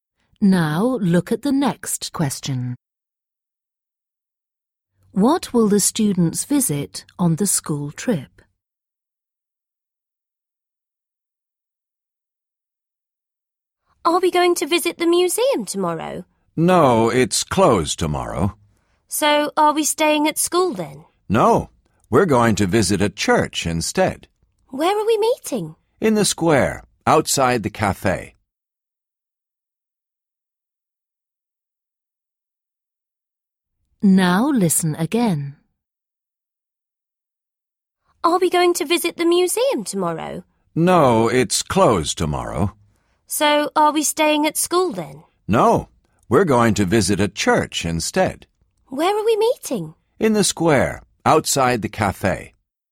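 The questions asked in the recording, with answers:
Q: What will the students visit on the school trip?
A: a church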